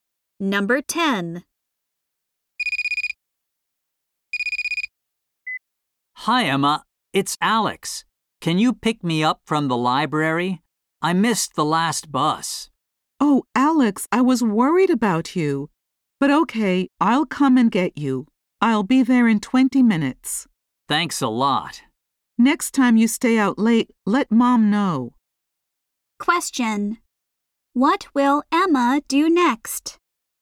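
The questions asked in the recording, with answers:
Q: What will Emma do next?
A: Pick Alex up from the library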